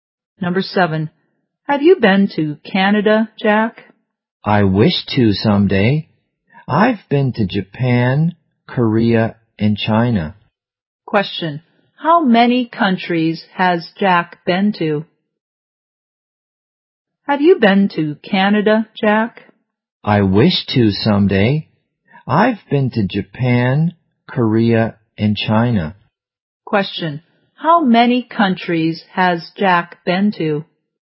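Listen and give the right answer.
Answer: Three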